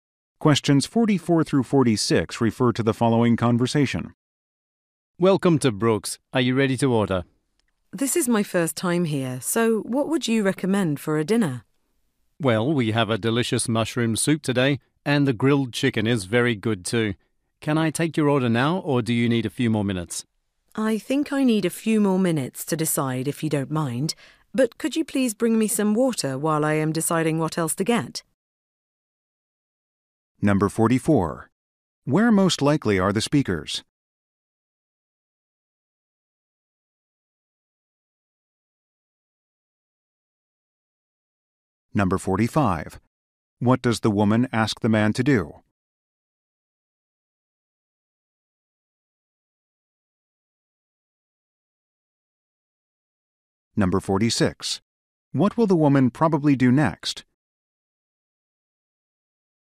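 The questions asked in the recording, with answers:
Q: Where most likely are the speakers?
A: At a restaurant

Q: What does the woman ask the man to do?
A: Bring some water

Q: What will the woman probably do next?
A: Decide what to order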